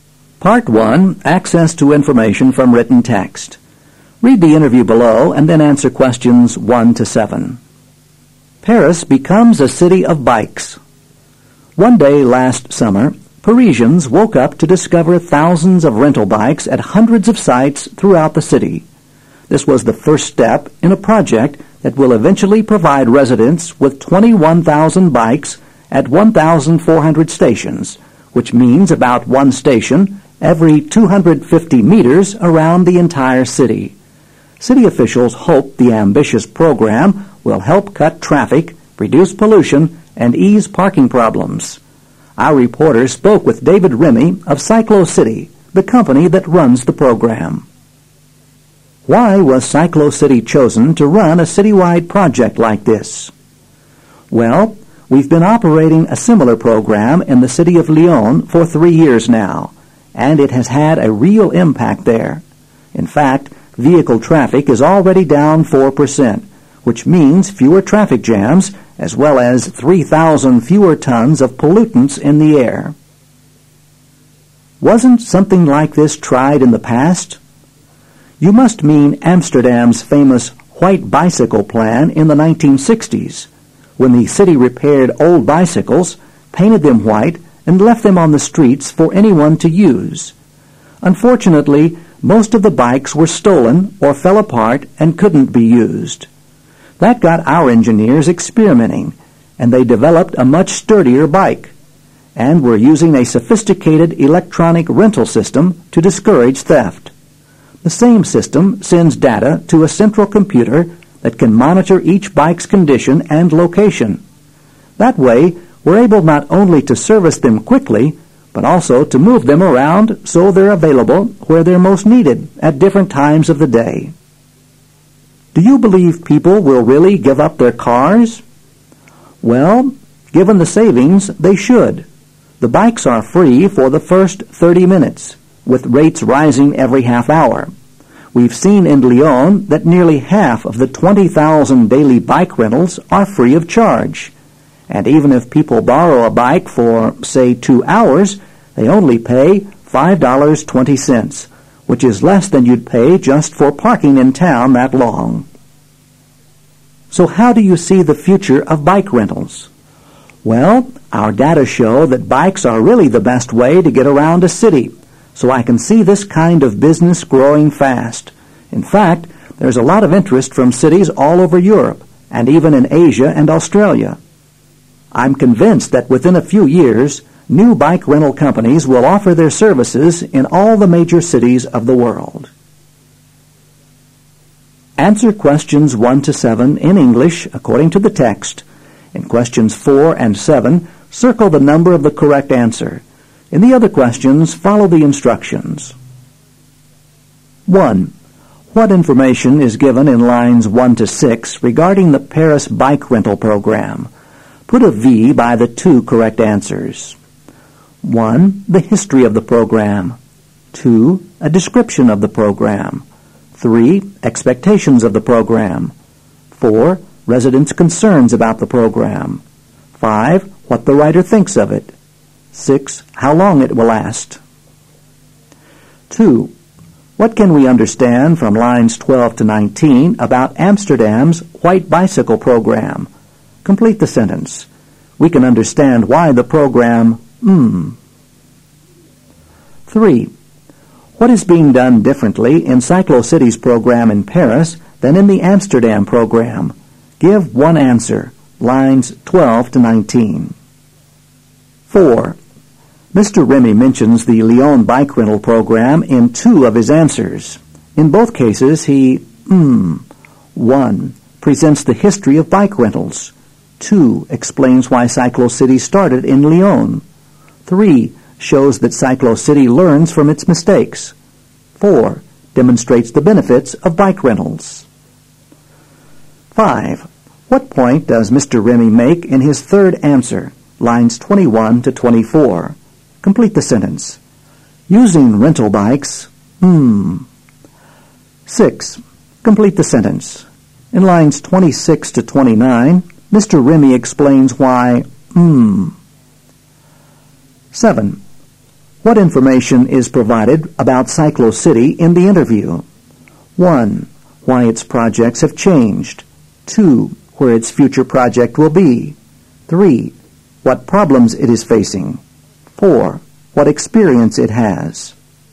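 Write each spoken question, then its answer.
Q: What information is given in lines 1 to 6 regarding the Paris bike rental program?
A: 2: A description of the program; 3: Expectations of the program

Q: What is being done differently in Cyclo City's program in Paris than in the Amsterdam program?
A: They use a much sturdier bike and an electronic rental system to discourage theft

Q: Mr. Remy mentions the Lyon bike rental program in two of his answers.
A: 4: demonstrates the benefits of bike rentals

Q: What information is provided about Cyclo City in the interview?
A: 4: What experience it has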